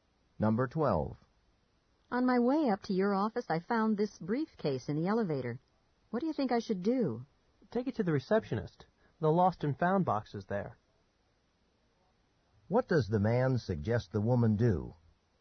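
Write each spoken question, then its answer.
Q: What does the man suggest the woman do?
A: Take the briefcase to the receptionist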